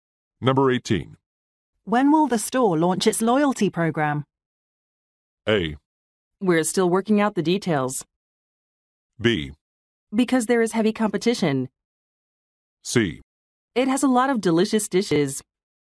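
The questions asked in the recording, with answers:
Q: When will the store launch its loyalty program?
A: A: We're still working out the details.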